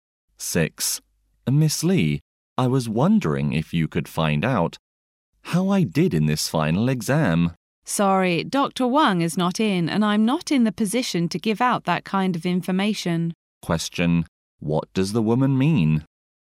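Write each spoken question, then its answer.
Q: What does the woman mean?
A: She can't tell him his exam result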